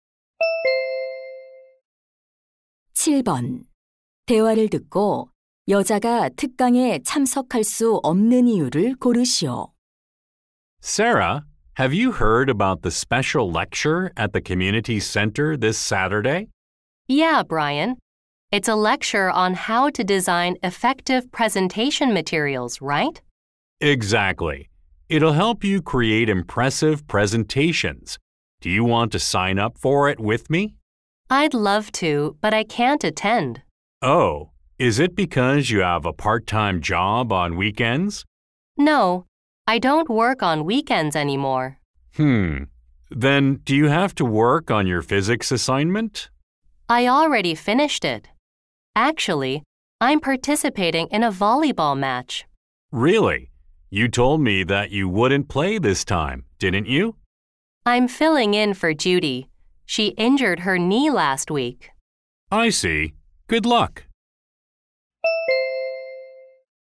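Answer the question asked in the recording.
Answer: 배구 시합에 (다친 친구 대신) 참가해야 해서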